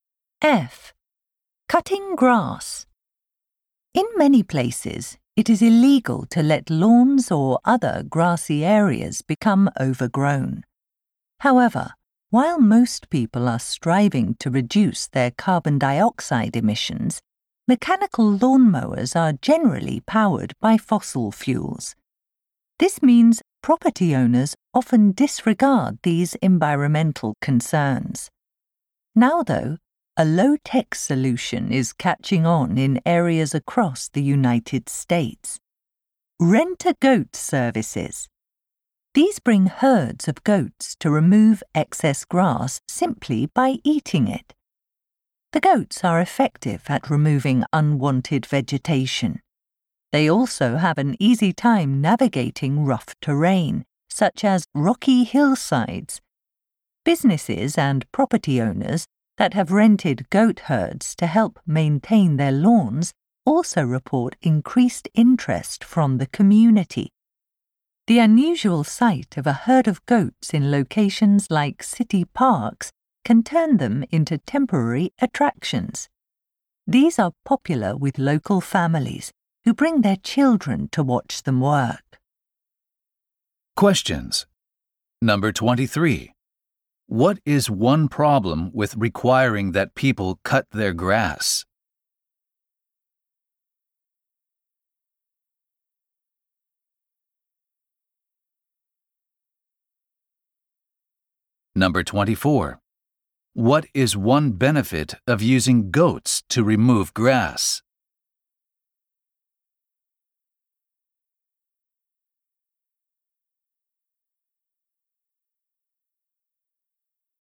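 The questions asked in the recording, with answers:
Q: What is one problem with requiring that people cut their grass?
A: Lawnmowers burn fossil fuels and produce carbon dioxide.

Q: What is one benefit of using goats to remove grass?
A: They can easily get around rough terrain.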